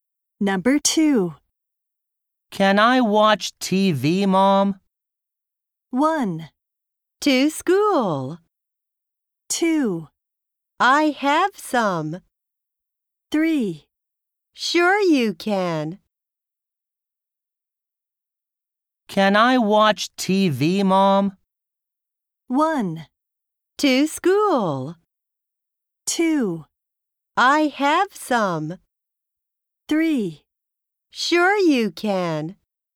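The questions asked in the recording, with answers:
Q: Can I watch TV, Mom?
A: 3: Sure you can.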